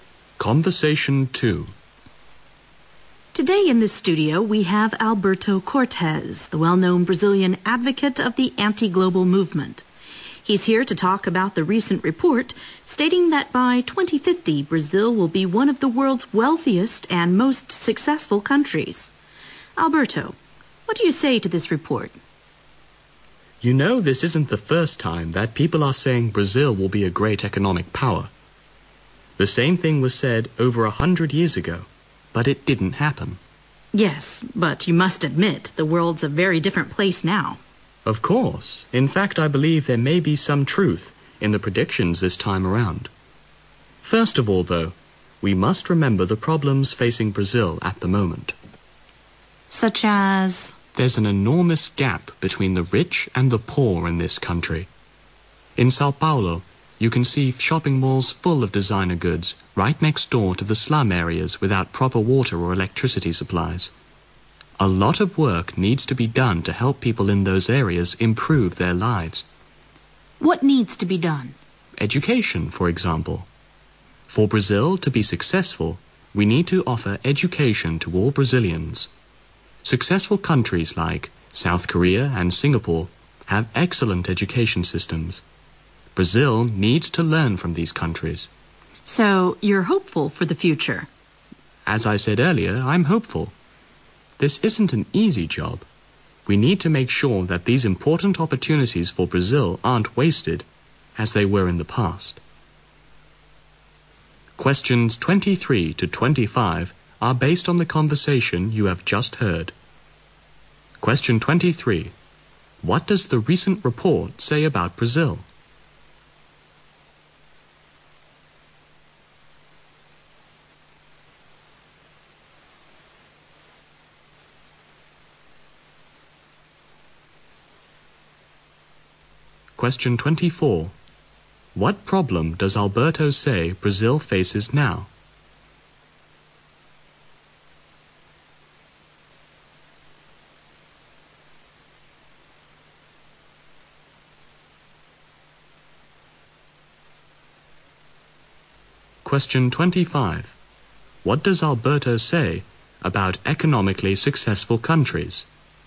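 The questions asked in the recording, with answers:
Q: What does the recent report say about Brazil?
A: By 2050 it will be one of the world's wealthiest and most successful countries.

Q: What problem does Alberto say Brazil faces now?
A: An enormous gap between the rich and the poor

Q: What does Alberto say about economically successful countries?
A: They have excellent education systems.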